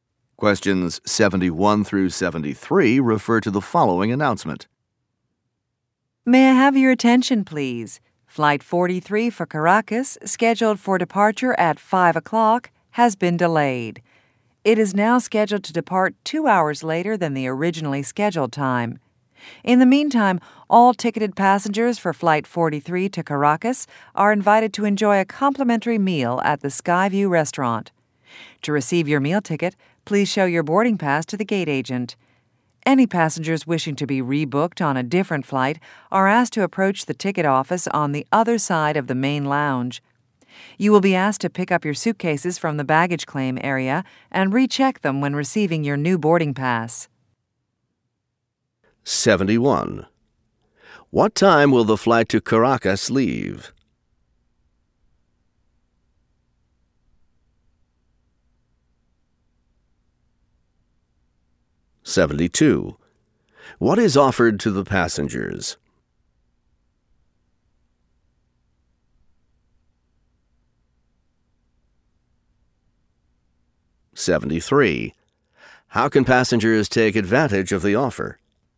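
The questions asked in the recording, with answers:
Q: What time will the flight to Caracas leave?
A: At 7 o'clock

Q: What is offered to the passengers?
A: A free meal at the Skyview Restaurant

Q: How can passengers take advantage of the offer?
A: By showing their boarding pass to the gate agent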